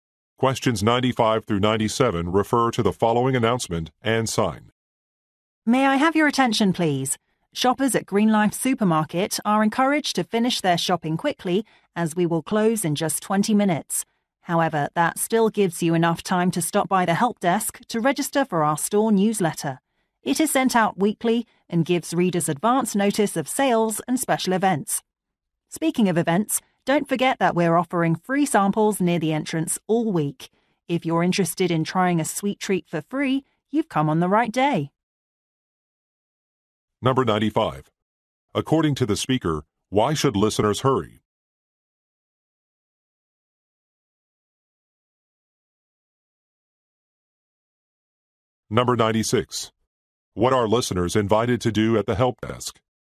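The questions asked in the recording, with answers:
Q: According to the speaker, why should listeners hurry?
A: The store closes in 20 minutes

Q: What are listeners invited to do at the help desk?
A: Register for the newsletter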